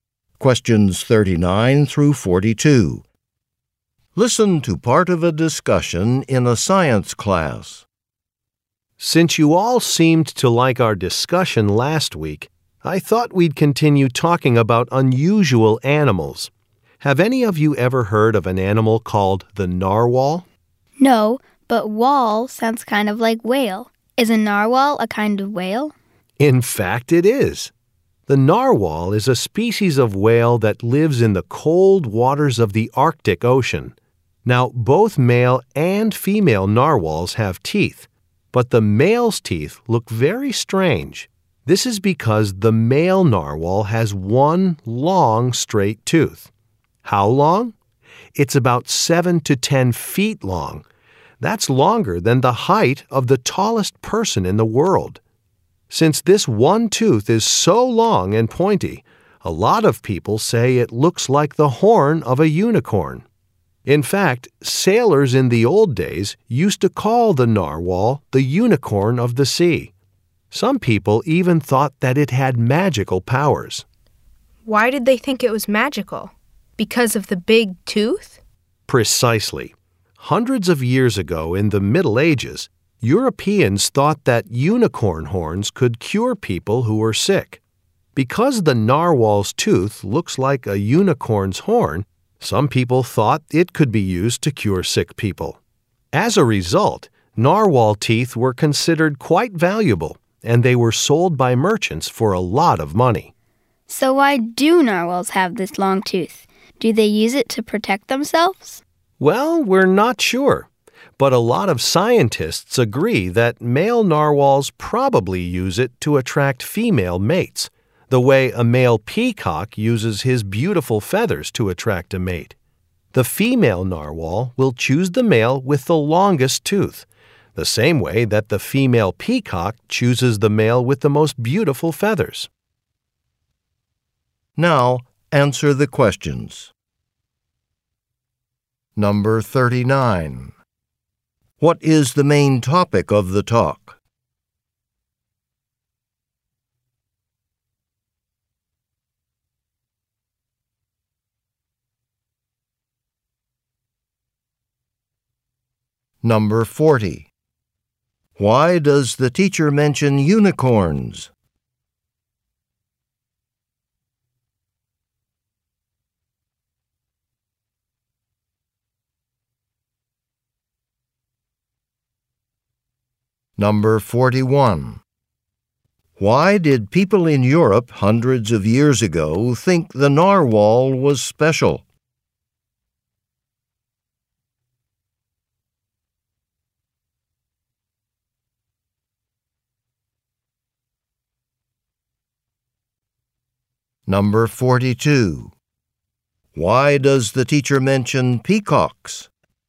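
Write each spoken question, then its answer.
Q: What is the main topic of the talk?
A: The narwhal, an unusual whale with a long tooth

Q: Why does the teacher mention unicorns?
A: Because the narwhal's long tooth looks like a unicorn's horn

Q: Why did people in Europe hundreds of years ago think the narwhal was special?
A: They thought its tooth could cure sick people

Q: Why does the teacher mention peacocks?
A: To compare how males attract mates: the narwhal's tooth is like the peacock's feathers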